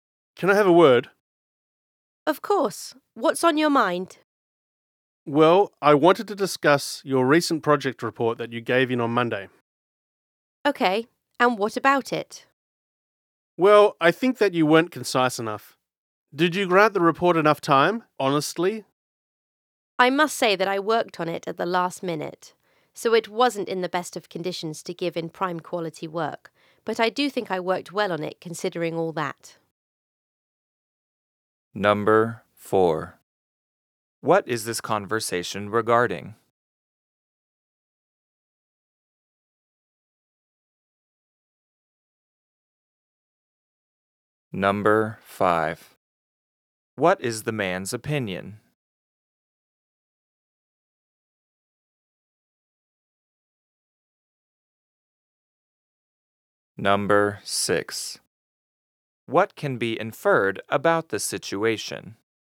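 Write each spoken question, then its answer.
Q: What is this conversation regarding?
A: A recent project report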